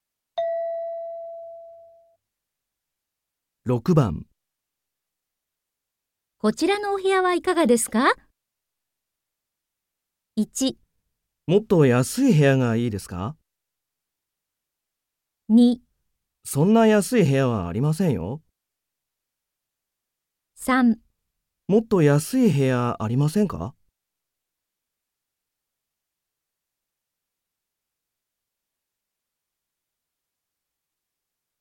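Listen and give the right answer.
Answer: もっと安い部屋、ありませんか。

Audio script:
F:こちらのお部屋はいかがですか。
M:1 もっと安い部屋がいいですか。
2 そんな安い部屋はありませんよ。
3 もっと安い部屋、ありませんか。

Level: N3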